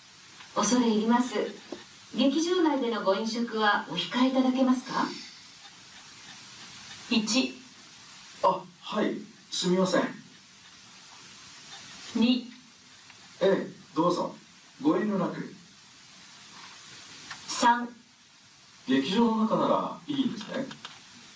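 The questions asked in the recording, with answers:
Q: 恐れ入ります。劇場内でのご飲食はお控えいただけますか。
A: 1: あ、はい、すみません。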